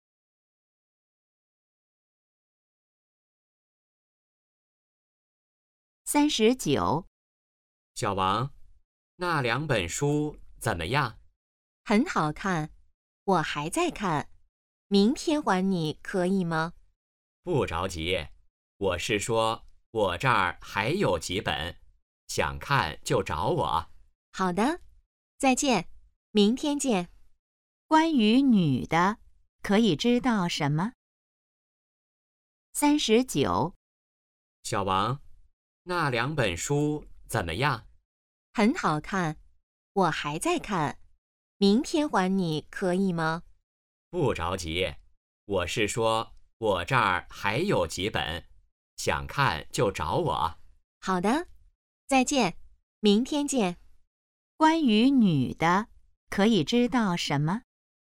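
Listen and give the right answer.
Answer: 书还没看完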